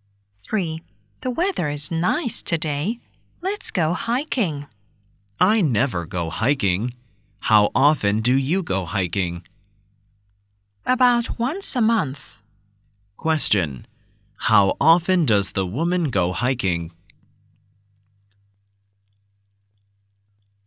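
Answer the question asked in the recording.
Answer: About once a month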